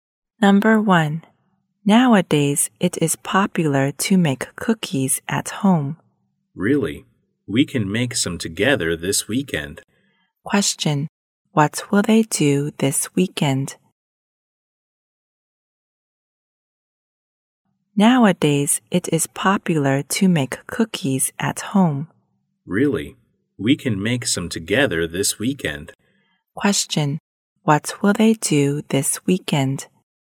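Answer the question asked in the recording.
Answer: Make cookies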